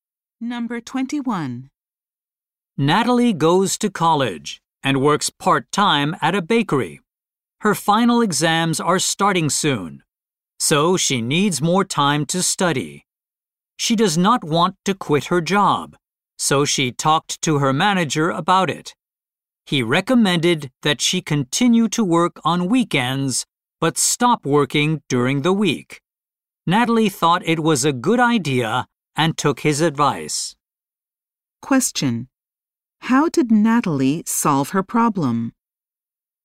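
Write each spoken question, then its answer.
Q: How did Natalie solve her problem?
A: She kept working only on weekends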